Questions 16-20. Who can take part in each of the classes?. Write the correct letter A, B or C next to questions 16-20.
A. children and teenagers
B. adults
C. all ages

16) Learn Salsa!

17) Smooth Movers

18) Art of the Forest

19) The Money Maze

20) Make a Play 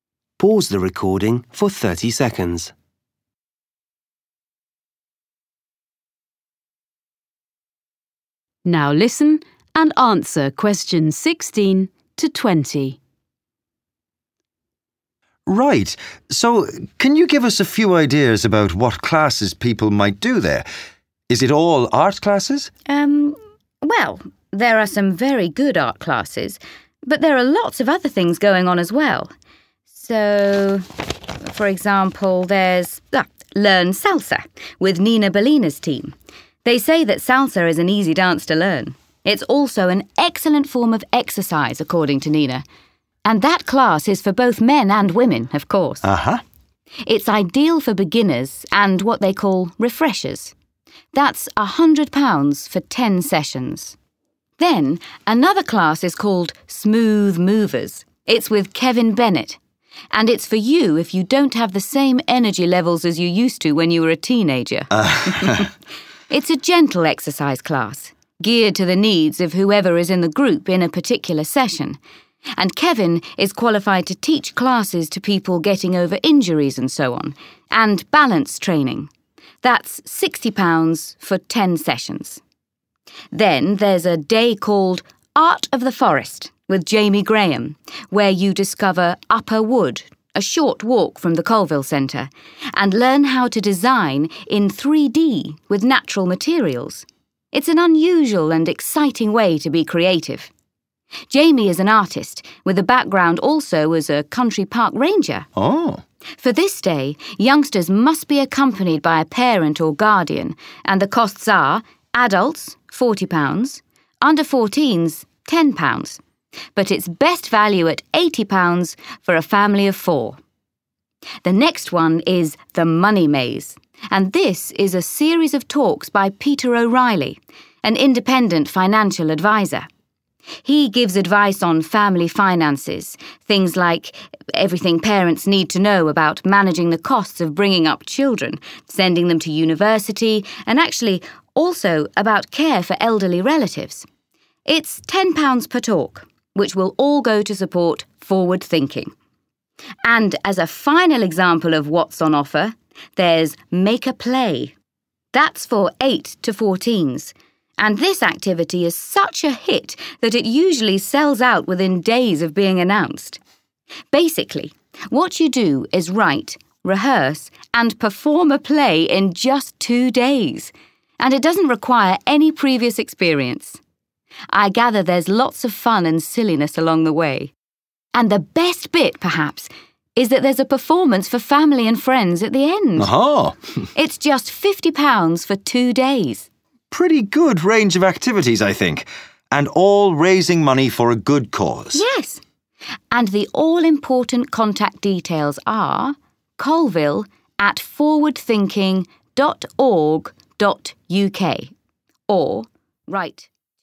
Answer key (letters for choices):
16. B
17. B
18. C
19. B
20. A

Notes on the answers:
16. It's also an excellent form of exercise, according to Nina, and that class is for both men and women, of course.(Họ nói rằng salsa là một điệu nhảy dễ học. Theo Nina, đây cũng là một hình thức tập thể dục tuyệt vời và lớp học đó tất nhiên là dành cho cả nam và nữ).
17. It's with Kevin Bennett and it's for you if you don't have the same energy levels as you used to when you were a teenager. (Đó là với Kevin Bennett và nó dành cho bạn nếu bạn không còn mức năng lượng như trước đây khi còn là một thiếu niên.)
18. For this day, youngsters must be accompanied by a parent or guardian and the costs are: adults £40. under-14s £10, but it's best value at £80 for a family of four. (Vào ngày này, trẻ em phải đi cùng với cha mẹ hoặc người giám hộ và chi phí là: người lớn £40. £10 dành cho trẻ dưới 14 tuổi, nhưng giá tốt nhất là £80 cho một gia đình bốn người).
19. He gives advice on family finances. things like everything parents need to know about managing the costs of bringing up children, sending them to university, and actually, also, about care for elderly relatives (Anh ấy đưa ra lời khuyên về tài chính gia đình. những thứ như mọi thứ cha mẹ cần biết về quản lý chi phí nuôi dạy con cái, gửi chúng đến trường đại học, và thực ra, cả về chăm sóc người thân lớn tuổi).

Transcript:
Fergus: Right, so can you give us a few ideas about what classes people might do there? Is it all art classes?
Jasmine: Um, well, there are some very good art classes, but there are lots of other things going on as well. So, for example, there's 'Learn Salsa!' with Nina Salina's team.
Jasmine: They say that salsa is an easy dance to learn. It's also an excellent form of exercise, according to Nina, and that class is for both men and women, of course.(Họ nói rằng salsa là một điệu nhảy dễ học. It's ideal for beginners and what they call 'refreshers'. That's £100 for ten sessions.
Jasmine: Then another class is called 'Smooth Movers'. It's with Kevin Bennett and it's for you if you don't have the same energy levels as you used to when you were a teenager.
Jasmine: It's a gentle exercise class, geared to the needs of whoever is in the group in a particular session. And Kevin is qualified to teach classes to people getting over injuries and so on, and balance training. That's £60 for ten sessions.
Then there's a day called 'Art of the Forest', with Jamie Graham, where you discover Upper Wood, a short walk from the Colville Centre, and learn how to design in 3-D with natural materials. It's an unusual and exciting way to be creative.
Jamie is an artist, with a background also as a country park ranger. For this day, youngsters must be accompanied by a parent or guardian and the costs are: adults £40. under-14s £10, but it's best value at £80 for a family of four.
The next one is 'The Money Maze', and this is a series of talks by Peter O'Reilly, an Independent Financial Adviser.
He gives advice on family finances. things like everything parents need to know about managing the costs of bringing up children, sending them to university, and actually, also, about care for elderly relatives (Anh ấy đưa ra lời khuyên về tài chính gia đình. It's £10 per talk, which will all go to support Forward thinking.
And as a final example of what's on offer, there's 'Make a Play'. That's for 8-14s and this activity is such a hit that it usually sells out within days of being announced.
Basically what you do is write, rehearse and perform a play in just two days and it doesn't require any previous experience. l gather there's lots of fun and silliness along the way and the best bit perhaps is that there's a performance for family and friends at the end. It's just £50 for two days.
Pretty good range of activities, I think. And all raising money for a good cause.
Yes! And the all-important contact details are: colville@forwardthinking.org.uk or write to me ...